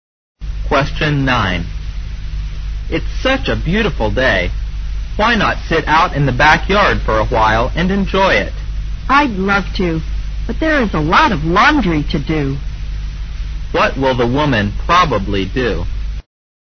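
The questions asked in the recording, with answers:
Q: What will the woman probably do?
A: Do the laundry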